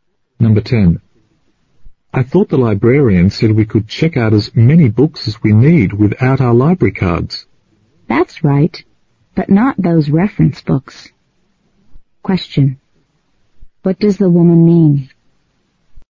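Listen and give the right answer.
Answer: Reference books can't be checked out.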